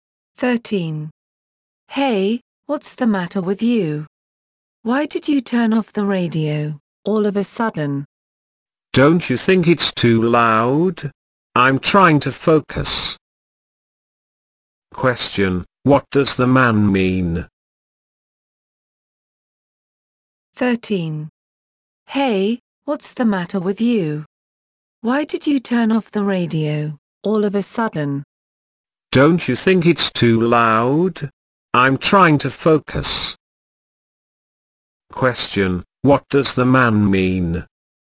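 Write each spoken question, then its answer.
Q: Question, what does the man mean?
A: The radio is too loud; he is trying to focus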